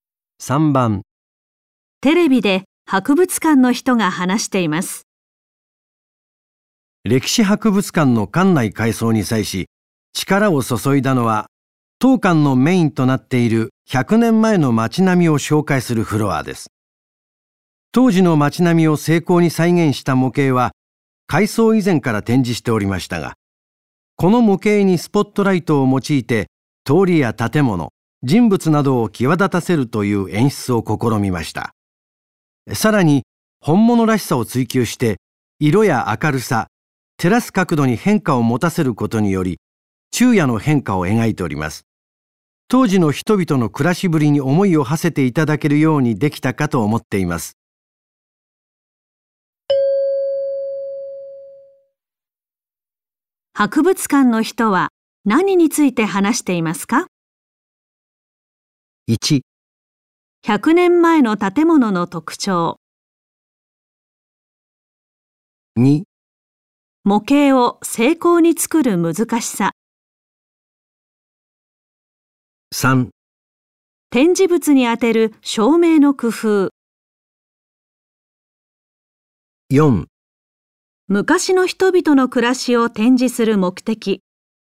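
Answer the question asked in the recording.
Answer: 3: 展示物に当てる照明の工夫。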